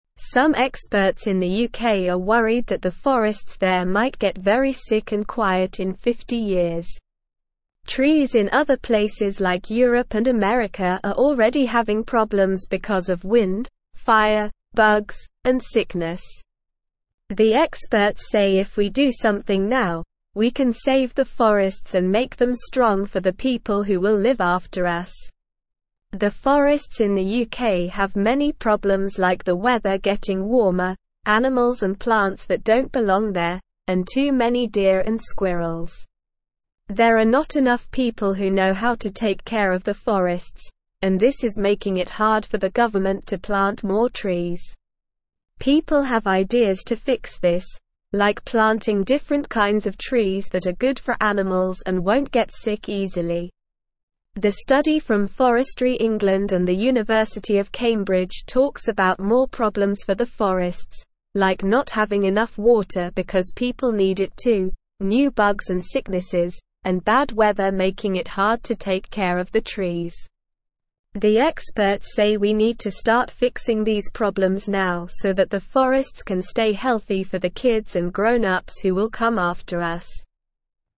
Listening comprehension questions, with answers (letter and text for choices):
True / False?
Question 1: Trees in Europe and America are already having problems because of wind, fire, bugs, and sickness.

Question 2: Experts in the UK are worried that the forests there might become sick and quiet in 50 years.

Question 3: People have no ideas to fix the problems, like planting different kinds of trees that are good for animals and won't get sick easily.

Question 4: The experts say we don't need to start fixing these problems now so that the forests can stay healthy for future generations.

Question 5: A study from Forestry England and the University of Cambridge talks about fewer problems for the forests, like having enough water, new bugs and sicknesses, and good weather.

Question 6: What are some of the problems that the forests in the UK are facing?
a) Pollution, noise, and traffic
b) Lack of sunlight, too much water, and too many flowers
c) Wind, fire, bugs, and sickness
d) Too many birds, too many rabbits, and too many trees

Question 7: Why are the forests in the UK having trouble getting enough water?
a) There is too much water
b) People need it too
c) The animals drink it all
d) The trees don't like water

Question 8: What is one idea to help the forests in the UK?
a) Cutting down all the trees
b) Building more houses in the forests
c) Planting different kinds of trees that are good for animals and won't get sick easily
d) Bringing more animals and plants that don't belong there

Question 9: Who did the study about the problems in the forests in the UK?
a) The government of the UK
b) Forestry England and the University of Cambridge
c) A group of kids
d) A group of animals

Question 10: What is one problem that makes it hard to take care of the trees in the forests?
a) Bad weather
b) Too many flowers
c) Too much sunlight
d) Too many birds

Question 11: What do the experts say we need to do to help the forests?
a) Wait and see what happens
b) Ignore the problems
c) Cut down all the trees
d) Start fixing the problems now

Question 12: What do the experts say we can do to save the forests and make them strong for the future?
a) Do something now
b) Do nothing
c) Cut down all the trees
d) Plant more flowers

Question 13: Trees in other (1)______ like Europe and (2)______ are already having problems because of wind, fire, bugs, and (3)______.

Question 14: Trees in other (1)______ like Europe and (2)______ are already having problems because of wind, fire, bugs, and (3)______.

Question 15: Trees in other (1)______ like Europe and (2)______ are already having problems because of wind, fire, bugs, and (3)______.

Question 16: The forests in the UK have many (4)______ like the weather (5)______ warmer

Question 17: The forests in the UK have many (4)______ like the weather (5)______ warmer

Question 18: There are not (6)______ people who know how to take care of the forests, and this is making it hard for the (7)______ to plant more (8)______.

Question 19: There are not (6)______ people who know how to take care of the forests, and this is making it hard for the (7)______ to plant more (8)______.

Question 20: There are not (6)______ people who know how to take care of the forests, and this is making it hard for the (7)______ to plant more (8)______.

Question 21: The study from Forestry England and the University of Cambridge (9)______ about more problems for the forests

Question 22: like not having enough water because people (10)______ it too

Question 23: bad weather (11)______ it hard to take care of the trees.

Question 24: so that the forests can stay healthy for the (12)______ and grown-ups who will come after us.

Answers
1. True
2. True
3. False
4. False
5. False
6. c) Wind, fire, bugs, and sickness
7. b) People need it too
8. c) Planting different kinds of trees that are good for animals and won't get sick easily
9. b) Forestry England and the University of Cambridge
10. a) Bad weather
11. d) Start fixing the problems now
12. a) Do something now
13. places
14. America
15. sickness
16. problems
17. getting
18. enough
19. government
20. trees
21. talks
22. need
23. making
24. kids

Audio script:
Some experts in the UK are worried that the forests there might get very sick and quiet in 50 years. Trees in other places like Europe and America are already having problems because of wind, fire, bugs, and sickness. The experts say if we do something now, we can save the forests and make them strong for the people who will live after us.
The forests in the UK have many problems like the weather getting warmer, animals and plants that don't belong there, and too many deer and squirrels. There are not enough people who know how to take care of the forests, and this is making it hard for the government to plant more trees. People have ideas to fix this, like planting different kinds of trees that are good for animals and won't get sick easily.
The study from Forestry England and the University of Cambridge talks about more problems for the forests, like not having enough water because people need it too, new bugs and sicknesses, and bad weather making it hard to take care of the trees. The experts say we need to start fixing these problems now so that the forests can stay healthy for the kids and grown-ups who will come after us.

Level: Level 2